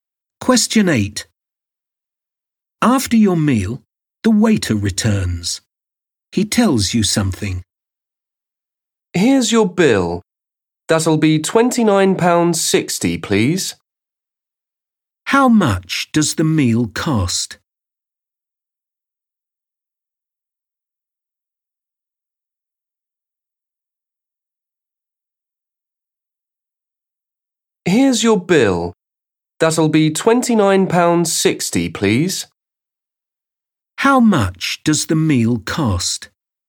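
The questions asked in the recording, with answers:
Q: How much does the meal cost?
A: £29.60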